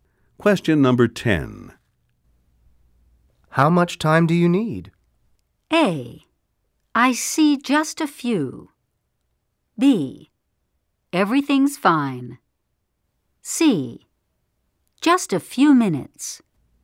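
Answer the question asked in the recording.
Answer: C: Just a few minutes.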